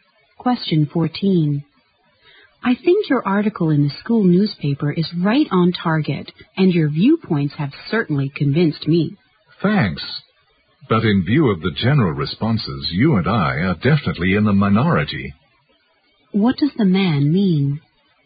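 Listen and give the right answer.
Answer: Few people share their views; they are in the minority.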